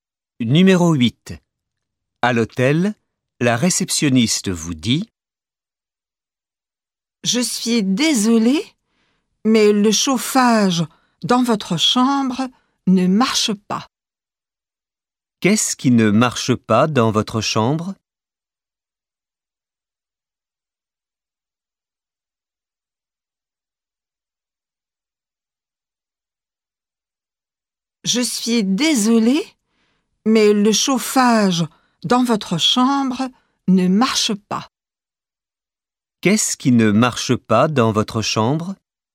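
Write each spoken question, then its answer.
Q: Qu'est-ce qui ne marche pas dans votre chambre?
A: Le chauffage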